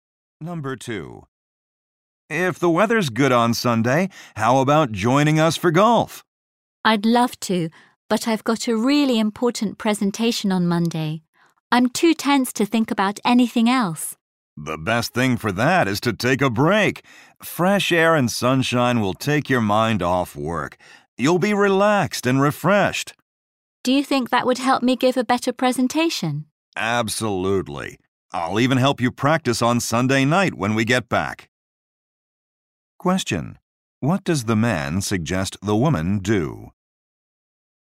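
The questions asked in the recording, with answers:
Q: What does the man suggest the woman do?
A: Take a break and play golf on Sunday to relax before her presentation.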